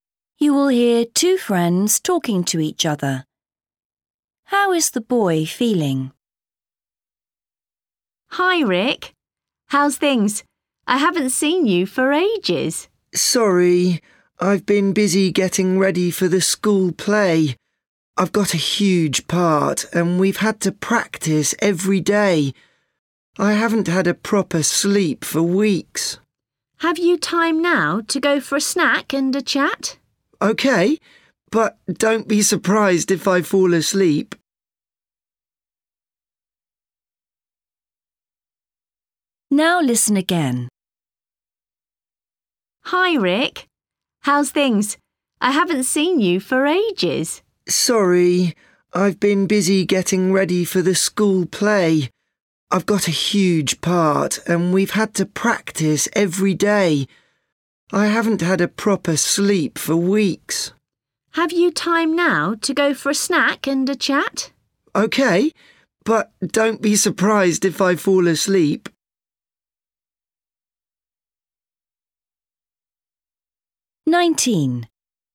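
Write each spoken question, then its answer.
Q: How is the boy feeling?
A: Tired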